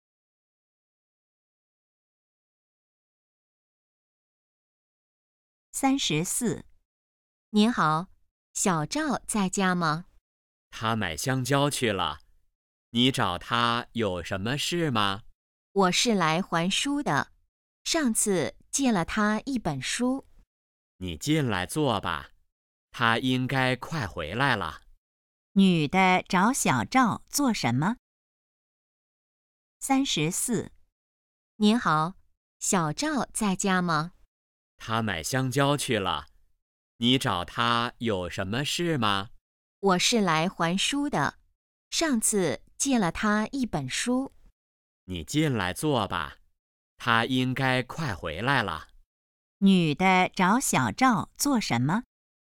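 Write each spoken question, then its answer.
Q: 女的找小赵做什么?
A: 还书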